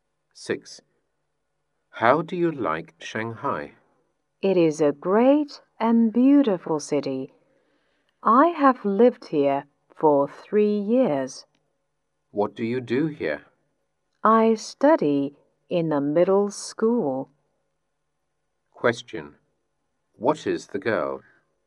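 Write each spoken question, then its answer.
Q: What is the girl?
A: A middle school student.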